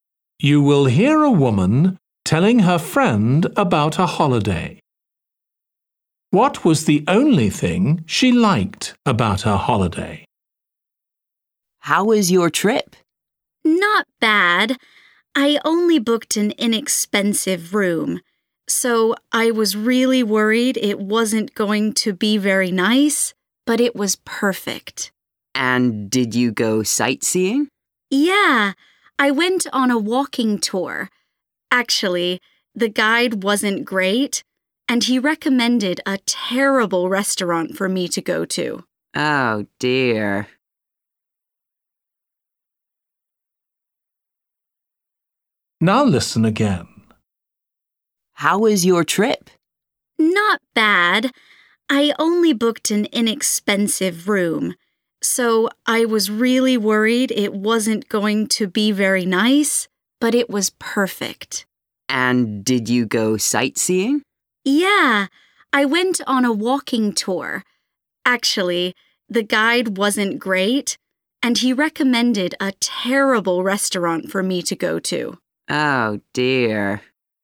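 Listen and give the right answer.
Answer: the room (accommodation)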